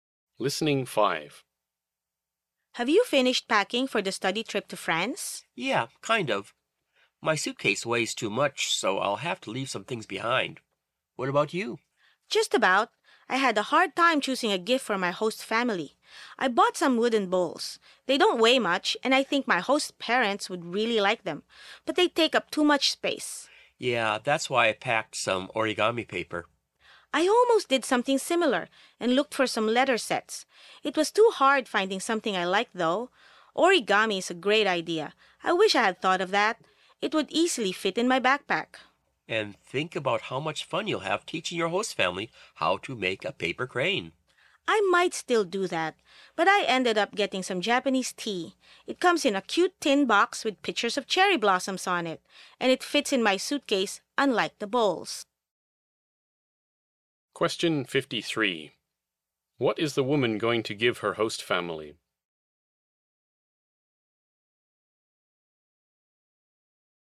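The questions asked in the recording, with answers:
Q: What is the woman going to give her host family?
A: Japanese tea in a tin box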